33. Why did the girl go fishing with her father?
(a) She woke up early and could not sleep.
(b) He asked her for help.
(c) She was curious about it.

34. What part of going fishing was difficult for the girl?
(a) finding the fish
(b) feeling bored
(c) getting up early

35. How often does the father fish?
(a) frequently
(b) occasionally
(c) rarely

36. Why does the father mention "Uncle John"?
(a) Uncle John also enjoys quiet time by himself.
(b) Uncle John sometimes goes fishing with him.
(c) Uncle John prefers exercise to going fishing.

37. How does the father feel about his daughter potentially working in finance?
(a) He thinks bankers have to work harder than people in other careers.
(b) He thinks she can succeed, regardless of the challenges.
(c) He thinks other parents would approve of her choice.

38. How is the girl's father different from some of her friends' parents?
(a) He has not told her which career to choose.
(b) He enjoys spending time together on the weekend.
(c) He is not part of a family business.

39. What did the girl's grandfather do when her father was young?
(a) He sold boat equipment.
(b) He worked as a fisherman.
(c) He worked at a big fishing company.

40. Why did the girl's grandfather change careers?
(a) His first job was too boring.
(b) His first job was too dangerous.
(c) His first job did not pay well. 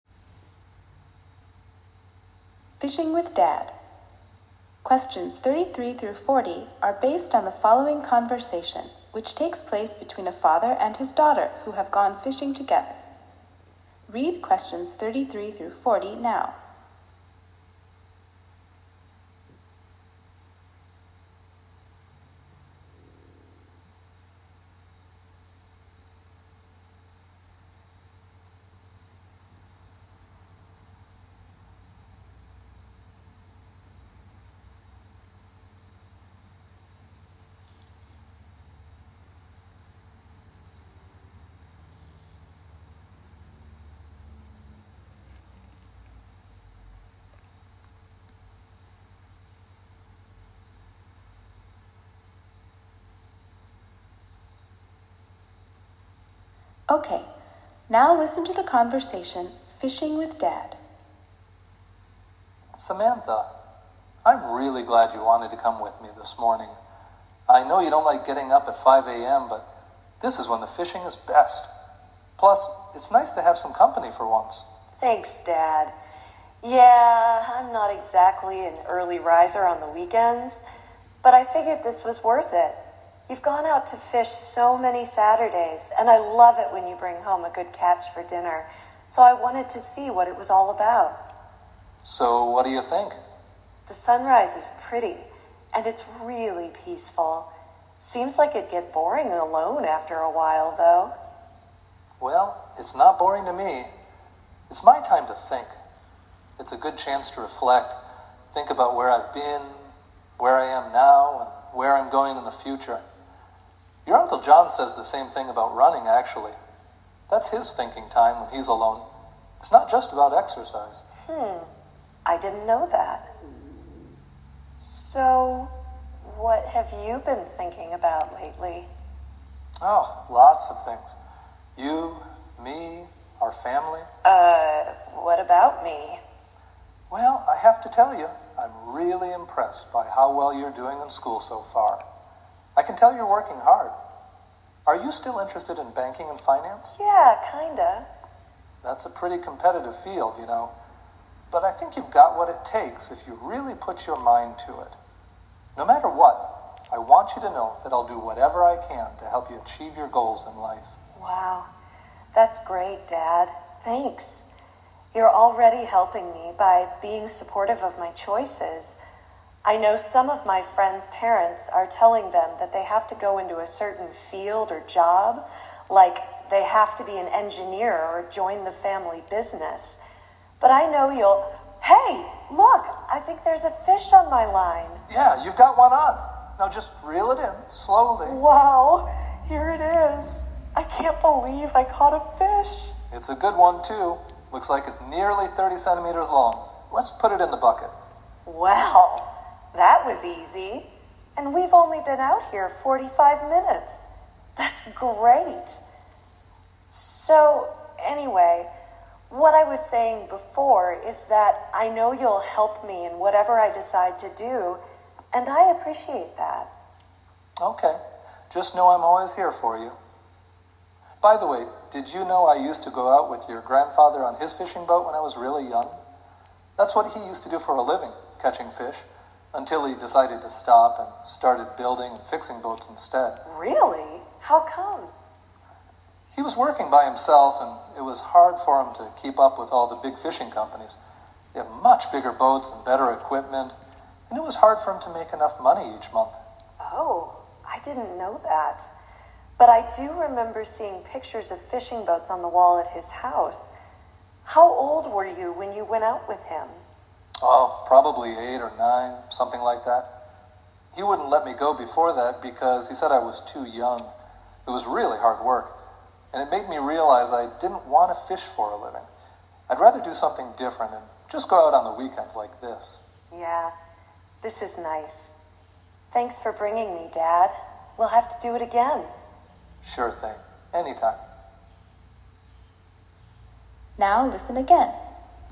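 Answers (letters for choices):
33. c
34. c
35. a
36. a
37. b
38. a
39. b
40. c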